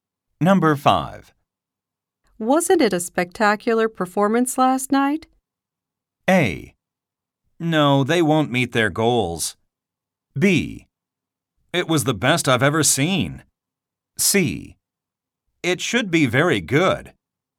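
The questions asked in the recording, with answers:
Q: Wasn't it a spectacular performance last night?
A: B: It was the best I've ever seen.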